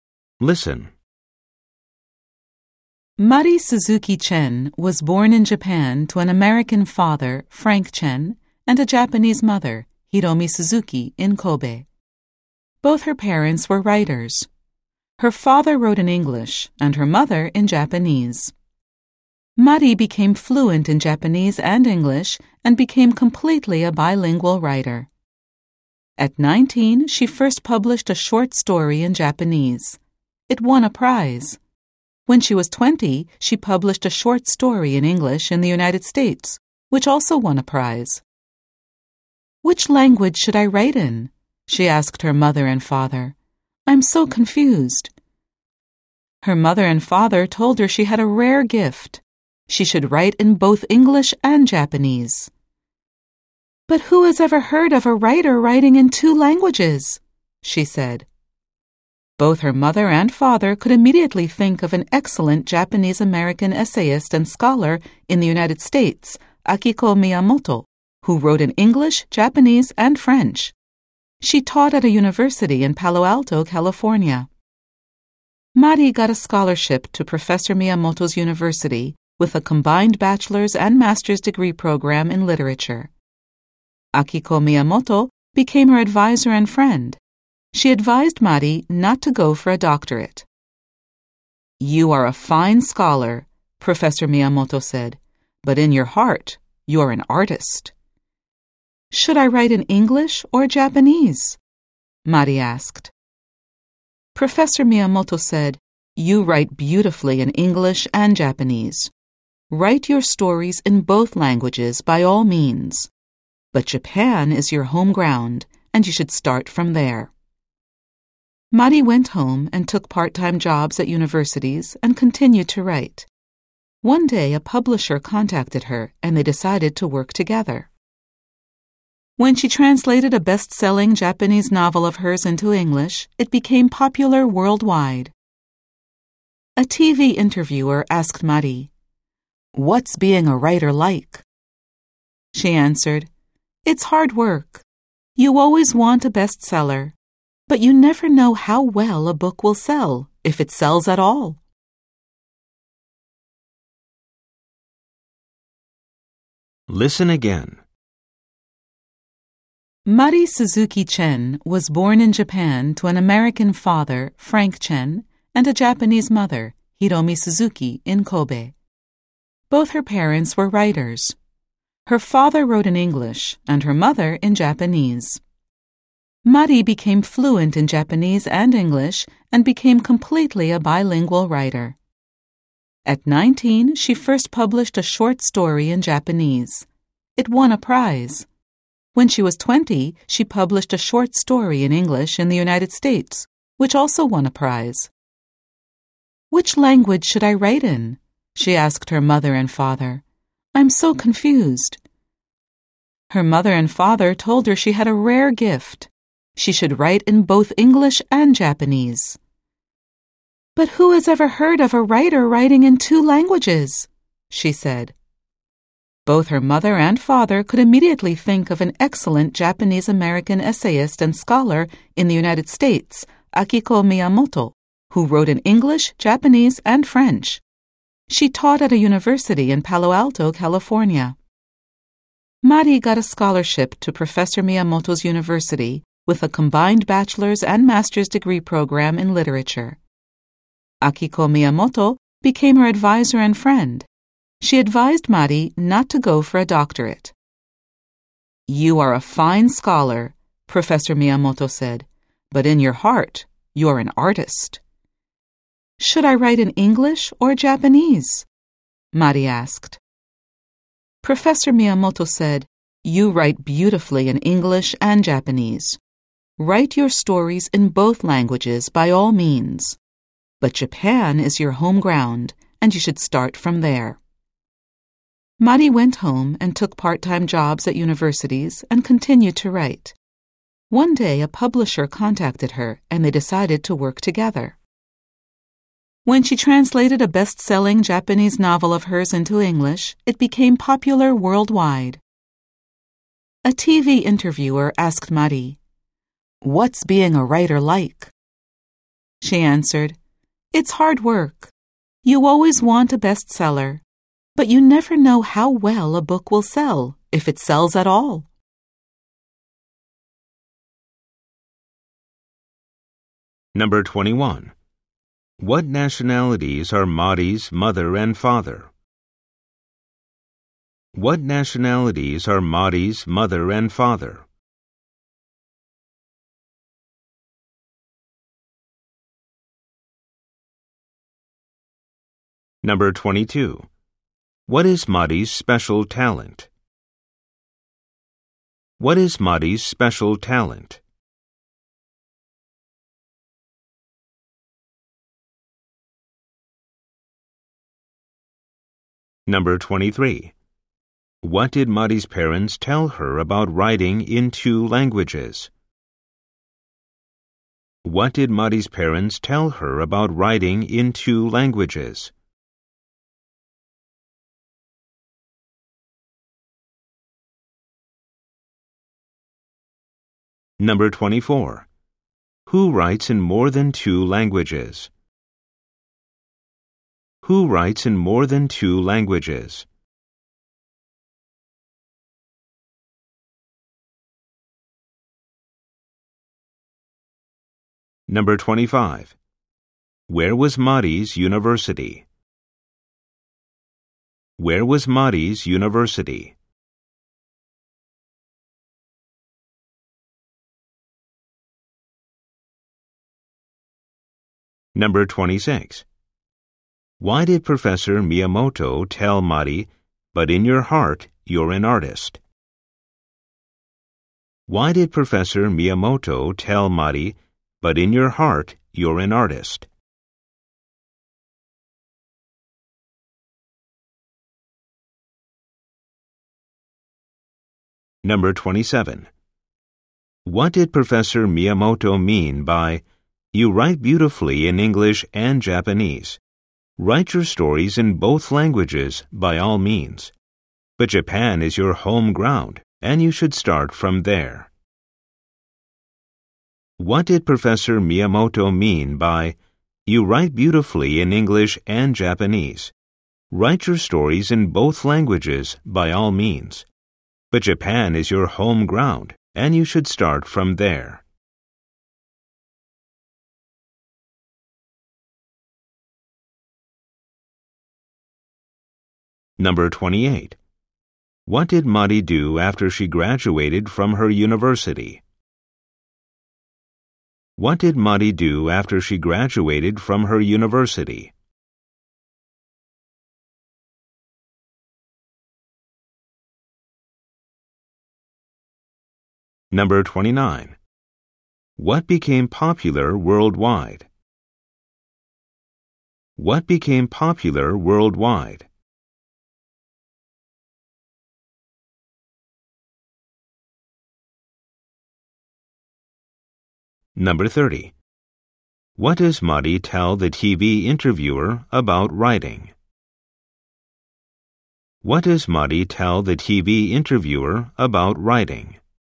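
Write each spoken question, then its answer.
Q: What nationalities are Mari's mother and father?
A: Her mother is Japanese and her father is American.

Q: What is Madi's special talent?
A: She can write well in both English and Japanese.

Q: What did Madi's parents tell her about writing in two languages?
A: She had a rare gift and should write in both English and Japanese.

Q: Who writes in more than two languages?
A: Akiko Miyamoto

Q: Where was Madi's university?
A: In Palo Alto, California

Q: What did Madi do after she graduated from her university?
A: She went home to Japan, took part-time jobs at universities and kept writing.

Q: What became popular worldwide?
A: Her English translation of her best-selling Japanese novel

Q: What does Madi tell the TV interviewer about writing?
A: It's hard work; you never know how well a book will sell.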